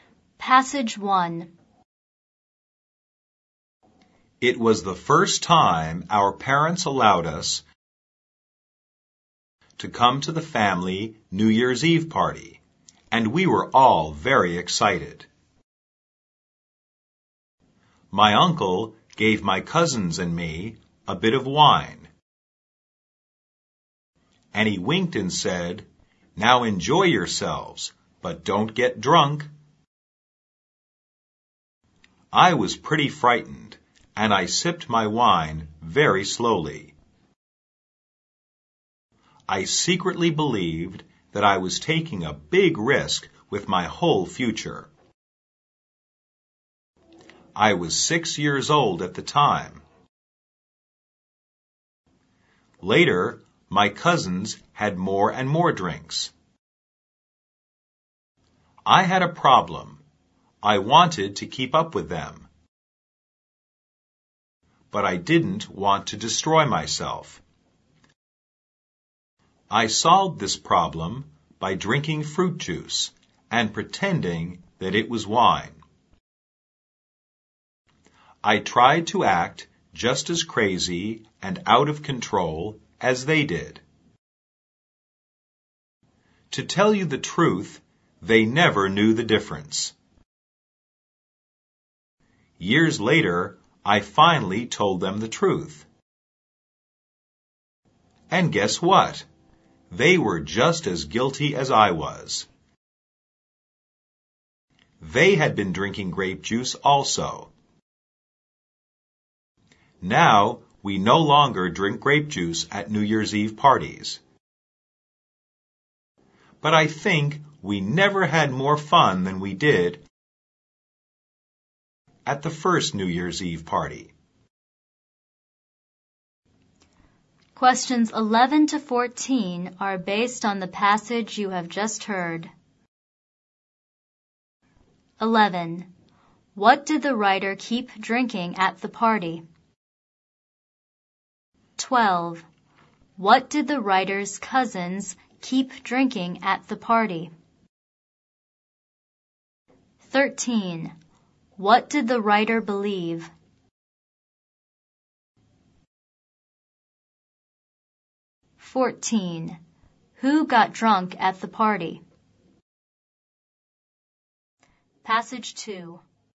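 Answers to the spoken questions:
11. Fruit juice
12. Grape juice
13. That he was taking a big risk with his whole future
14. Nobody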